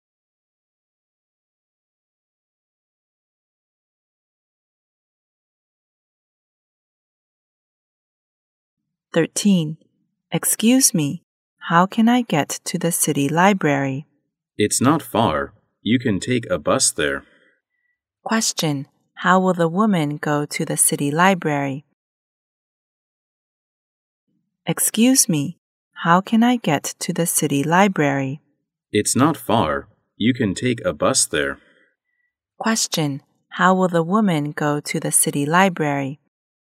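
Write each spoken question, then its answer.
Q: how will the woman go to the city library?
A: By bus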